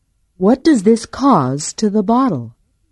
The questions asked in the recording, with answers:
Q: What does this cause to the bottle?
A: This causes the bottle to break.